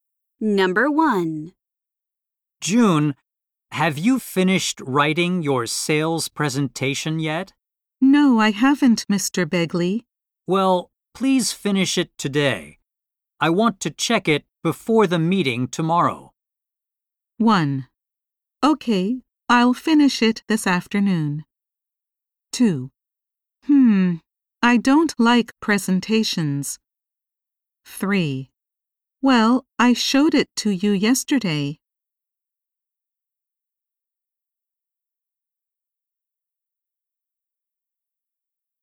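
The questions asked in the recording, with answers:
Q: I want to check it before the meeting tomorrow.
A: 1: Okay, I'll finish it this afternoon.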